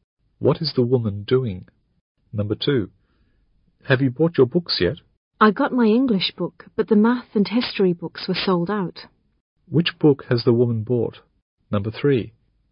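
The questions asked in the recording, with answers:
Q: Which book has the woman bought?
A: Her English book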